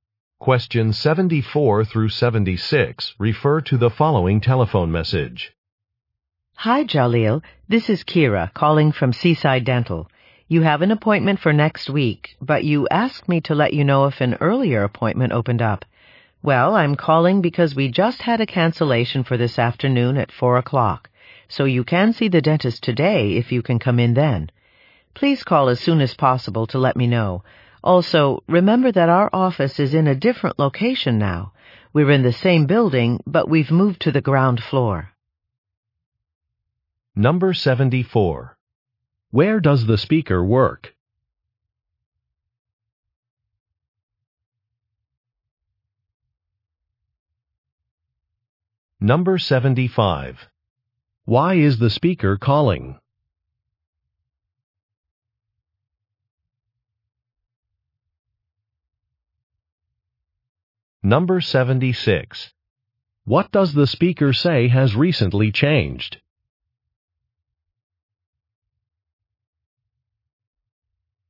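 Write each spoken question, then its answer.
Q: Where does the speaker work?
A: At a dental office

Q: Why is the speaker calling?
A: To offer an earlier appointment

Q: What does the speaker say has recently changed?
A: The office location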